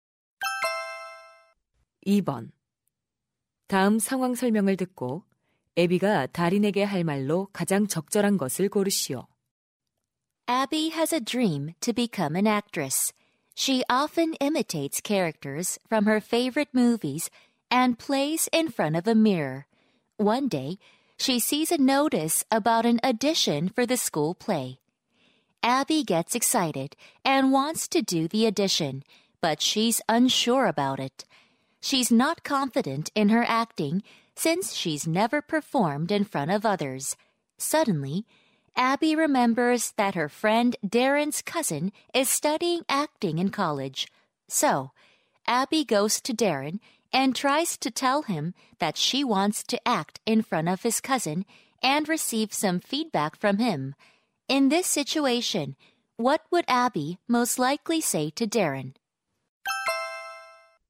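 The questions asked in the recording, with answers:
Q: In this situation, what would Abby most likely say to Darren?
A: Could I act in front of your cousin and get some feedback from him?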